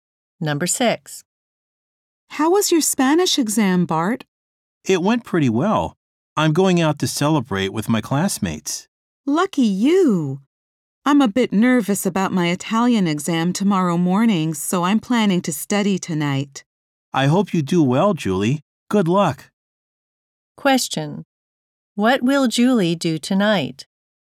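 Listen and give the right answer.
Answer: Study for her Italian exam.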